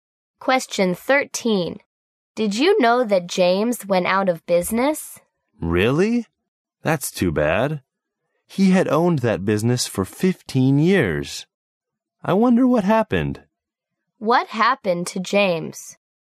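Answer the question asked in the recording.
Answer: His business failed (he went out of business)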